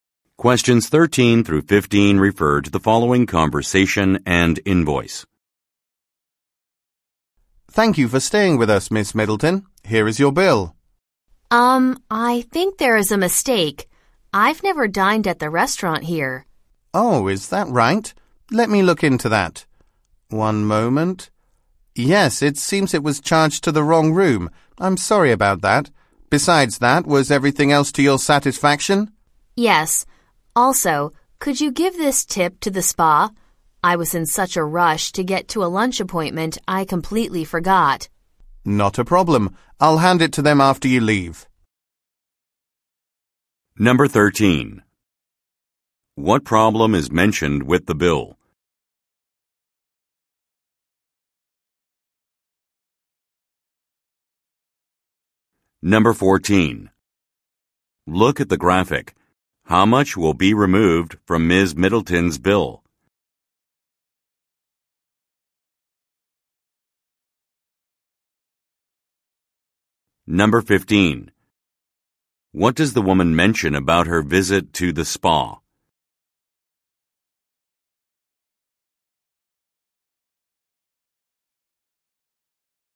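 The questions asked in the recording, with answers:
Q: What problem is mentioned with the bill?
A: A restaurant charge from another room was put on it

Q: What does the woman mention about her visit to the spa?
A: She forgot to leave a tip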